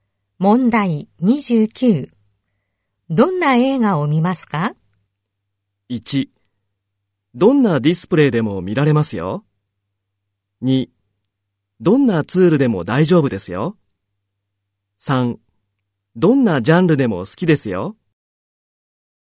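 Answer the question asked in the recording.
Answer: 3: どんなジャンルでも好きですよ。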